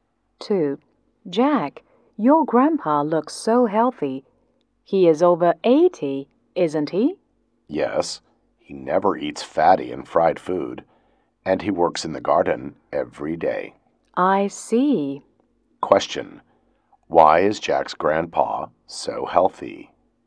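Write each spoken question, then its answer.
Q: Why is Jack's grandpa so healthy?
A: He never eats fatty and fried food and works in the garden every day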